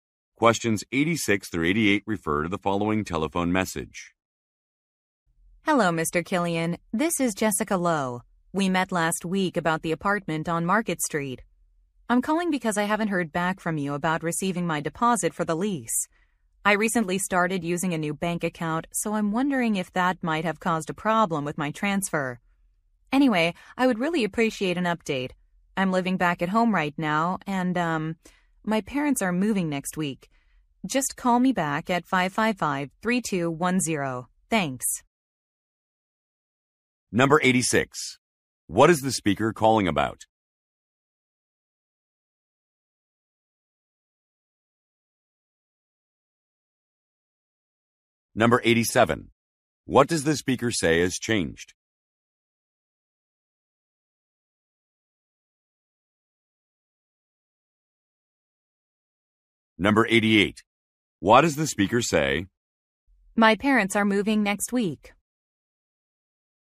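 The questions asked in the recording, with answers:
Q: What is the speaker calling about?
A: A deposit for an apartment lease

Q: What does the speaker say has changed?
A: Her bank account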